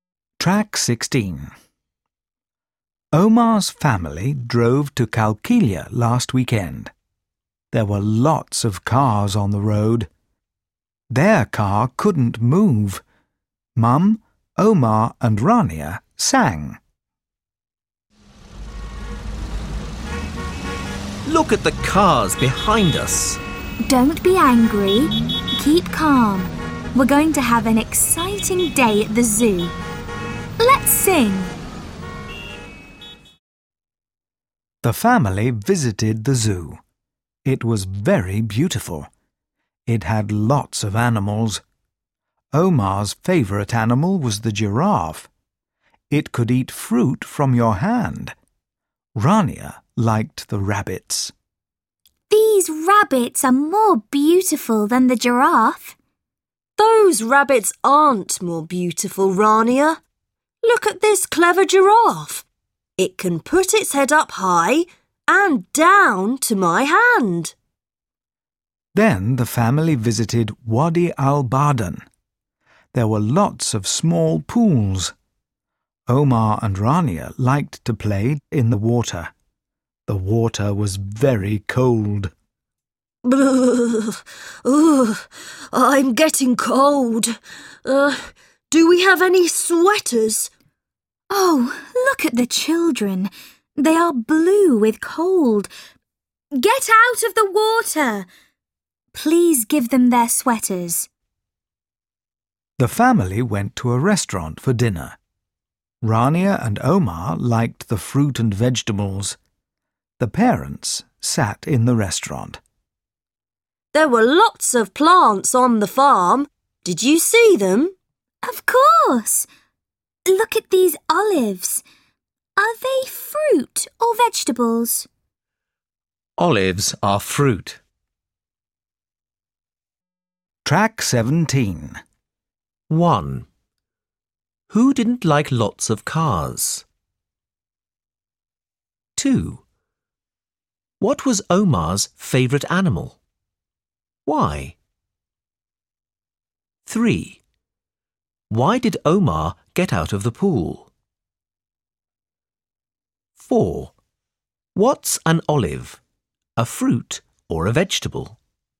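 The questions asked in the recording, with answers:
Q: What was Omar's favourite animal?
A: The giraffe

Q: Why did Omar get out of the pool?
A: The water was very cold

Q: What's an olive, a fruit or a vegetable?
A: A fruit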